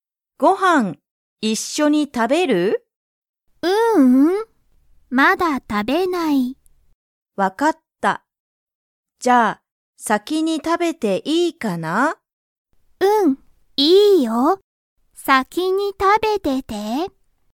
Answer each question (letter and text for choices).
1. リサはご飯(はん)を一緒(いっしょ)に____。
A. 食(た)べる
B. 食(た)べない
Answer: B. 食(た)べない

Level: Level 1